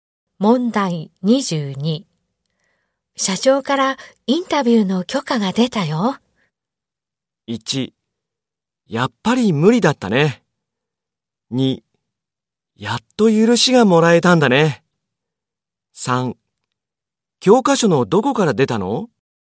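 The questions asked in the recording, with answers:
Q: 社長からインタビューの許可が出たよ。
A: 2: やっと許しがもらえたんだね。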